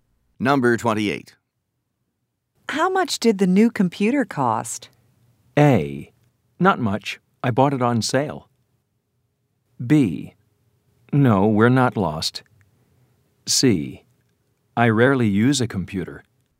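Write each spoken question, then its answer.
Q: How much did the new computer cost?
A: A: Not much. I bought it on sale.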